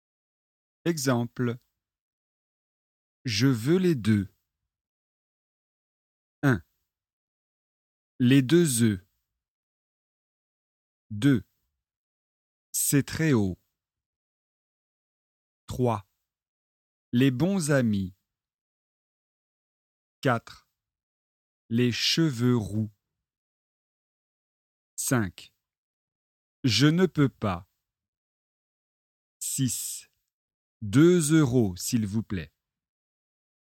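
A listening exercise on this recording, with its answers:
Exercice 7 : écoutez et cochez quand vous entendez [EU]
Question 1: Les deux oeufs.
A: oui

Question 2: C'est très haut.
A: non

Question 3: Les bons amis.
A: non

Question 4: Les cheveux roux.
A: oui

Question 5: Je ne peux pas.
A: oui

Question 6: Deux euros, s'il vous plaît.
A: oui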